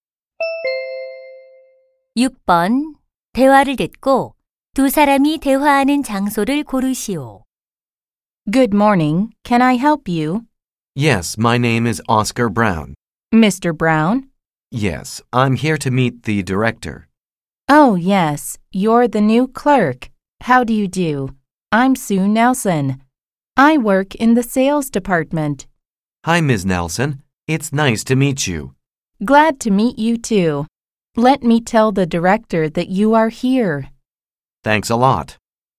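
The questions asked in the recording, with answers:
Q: 대화를 듣고 두 사람이 대화하는 장소를 고르시오.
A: 회사 사무실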